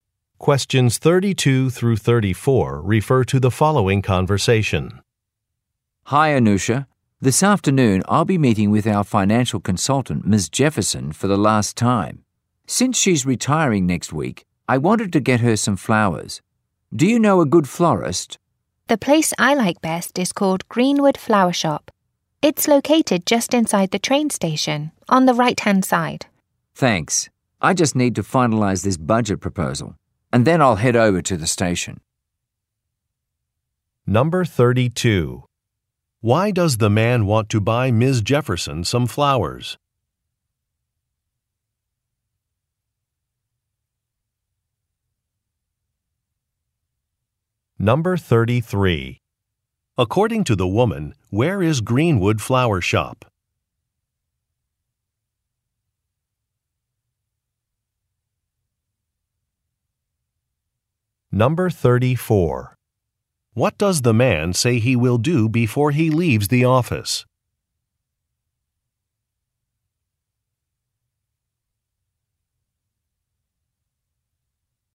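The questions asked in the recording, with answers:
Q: Why does the man want to buy Ms. Jefferson some flowers?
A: Because she is retiring next week

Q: According to the woman, where is Greenwood Flower Shop?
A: Just inside the train station, on the right-hand side

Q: What does the man say he will do before he leaves the office?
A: Finalize a budget proposal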